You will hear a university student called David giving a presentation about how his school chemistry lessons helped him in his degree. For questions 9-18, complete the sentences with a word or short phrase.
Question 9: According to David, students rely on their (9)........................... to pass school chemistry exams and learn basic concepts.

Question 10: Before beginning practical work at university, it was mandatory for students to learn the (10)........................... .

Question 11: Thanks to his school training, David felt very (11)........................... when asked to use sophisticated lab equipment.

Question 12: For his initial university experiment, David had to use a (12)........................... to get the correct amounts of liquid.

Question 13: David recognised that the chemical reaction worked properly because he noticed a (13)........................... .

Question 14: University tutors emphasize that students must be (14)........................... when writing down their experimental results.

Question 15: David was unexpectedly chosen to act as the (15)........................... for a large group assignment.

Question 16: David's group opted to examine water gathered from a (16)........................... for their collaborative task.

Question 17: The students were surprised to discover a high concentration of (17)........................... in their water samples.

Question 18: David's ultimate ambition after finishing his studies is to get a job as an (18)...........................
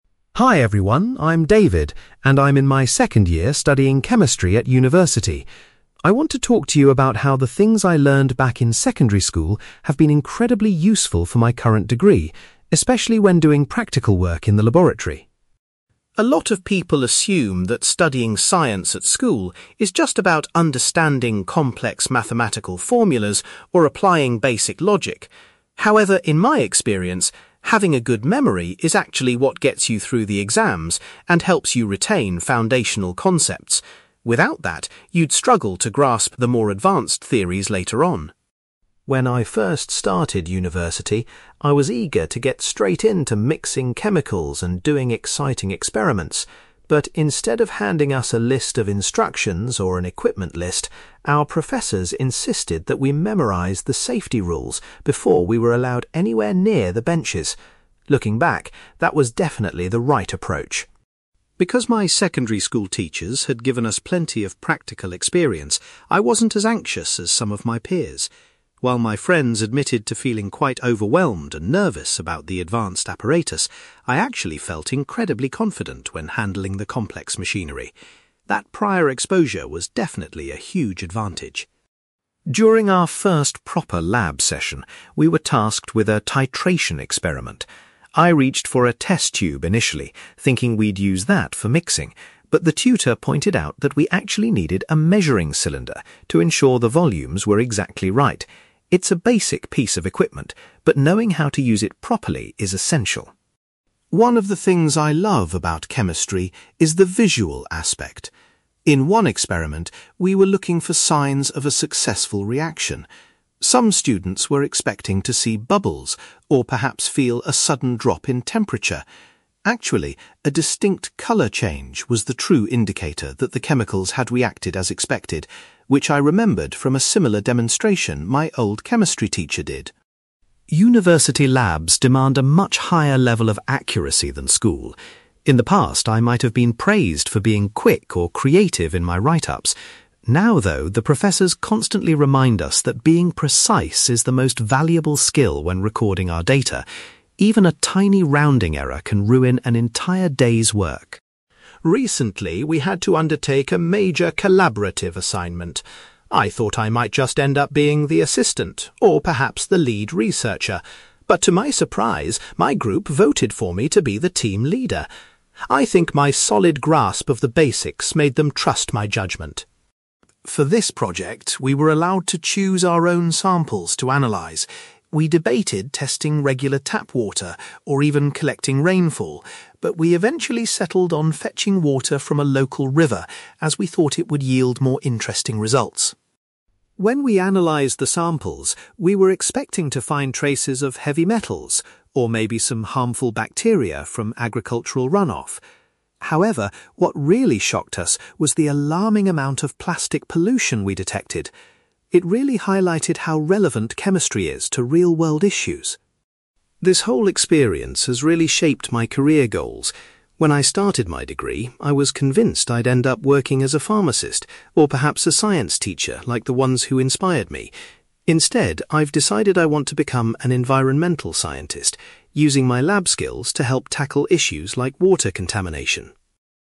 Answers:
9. memory
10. safety rules
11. confident
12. measuring cylinder
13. colour change
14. precise
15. team leader
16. local river
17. plastic pollution
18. environmental scientist

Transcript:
David: Hi everyone, I'm David, and I'm in my second year studying Chemistry at university. I want to talk to you about how the things I learned back in secondary school have been incredibly useful for my current degree, especially when doing practical work in the laboratory.
A lot of people assume that studying science at school is just about understanding complex mathematical formulas or applying basic logic. However, in my experience, having a good memory is actually what gets you through the exams and helps you retain foundational concepts. Without that, you'd struggle to grasp the more advanced theories later on.
When I first started university, I was eager to get straight into mixing chemicals and doing exciting experiments. But, instead of handing us a list of instructions or an equipment list, our professors insisted that we memorise the safety rules before we were allowed anywhere near the benches. Looking back, that was definitely the right approach.
Because my secondary school teachers had given us plenty of practical experience, I wasn't as anxious as some of my peers. While my friends admitted to feeling quite overwhelmed and nervous about the advanced apparatus, I actually felt incredibly confident when handling the complex machinery. That prior exposure was definitely a huge advantage.
During our first proper lab session, we were tasked with a titration experiment. I reached for a test tube initially, thinking we'd use that for mixing, but the tutor pointed out that we actually needed a measuring cylinder to ensure the volumes were exactly right. It's a basic piece of equipment, but knowing how to use it properly is essential.
One of the things I love about chemistry is the visual aspect. In one experiment, we were looking for signs of a successful reaction. Some students were expecting to see bubbles, or perhaps feel a sudden drop in temperature. Actually, a distinct colour change was the true indicator that the chemicals had reacted as expected, which I remembered from a similar demonstration my old chemistry teacher did.
University labs demand a much higher level of accuracy than school. In the past, I might have been praised for being quick or creative in my write-ups. Now, though, the professors constantly remind us that being precise is the most valuable skill when recording our data. Even a tiny rounding error can ruin an entire day's work.
Recently, we had to undertake a major collaborative assignment. I thought I might just end up being the assistant, or perhaps the lead researcher, but to my surprise, my group voted for me to be the team leader. I think my solid grasp of the basics made them trust my judgement.
For this project, we were allowed to choose our own samples to analyse. We debated testing regular tap water, or even collecting rainfall, but we eventually settled on fetching water from a local river, as we thought it would yield more interesting results.
When we analysed the samples, we were expecting to find traces of heavy metals, or maybe some harmful bacteria from agricultural runoff. However, what really shocked us was the alarming amount of plastic pollution we detected. It really highlighted how relevant chemistry is to real-world issues.
This whole experience has really shaped my career goals. When I started my degree, I was convinced I'd end up working as a pharmacist, or perhaps a science teacher like the ones who inspired me. Instead, I've decided I want to become an environmental scientist, using my lab skills to help tackle issues like water contamination.

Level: B2